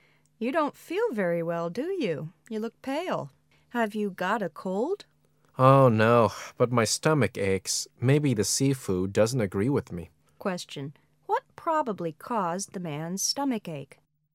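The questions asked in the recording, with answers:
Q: What probably caused the man's stomach ache?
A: The seafood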